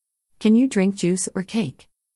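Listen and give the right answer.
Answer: juice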